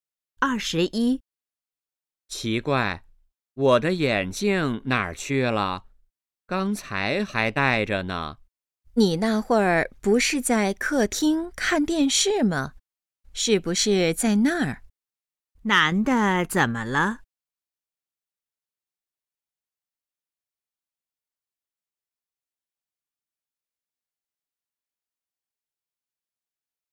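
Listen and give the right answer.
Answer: 找不到眼镜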